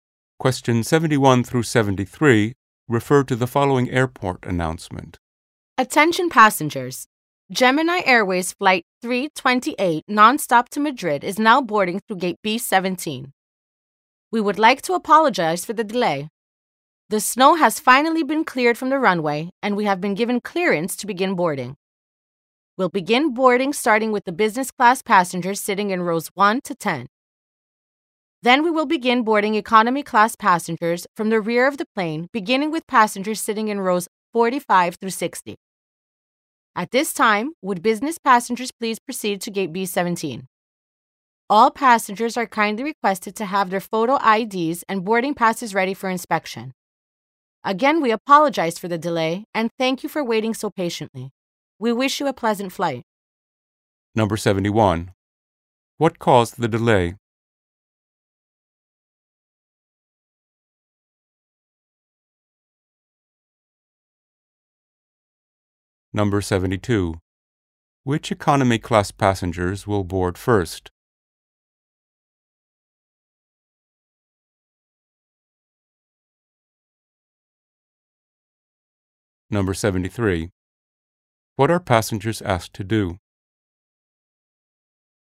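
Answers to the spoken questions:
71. Snow on the runway
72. Those sitting in rows 45 through 60
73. Have photo IDs and boarding passes ready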